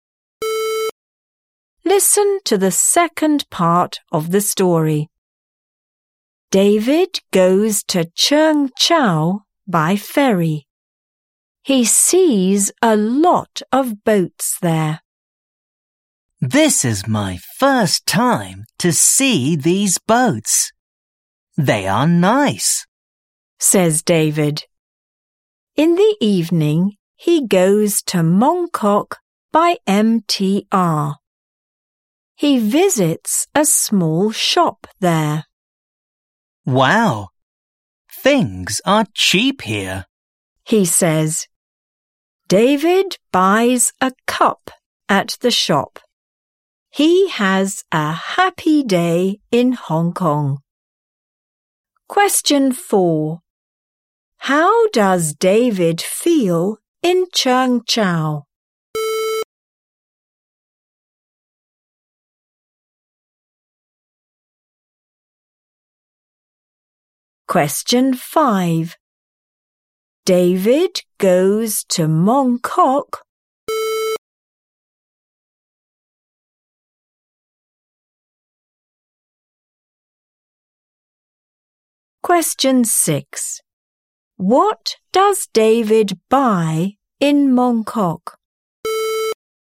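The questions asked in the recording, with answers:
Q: David goes to Mong Kok.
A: by MTR

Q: What does David buy in Mong Kok?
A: a cup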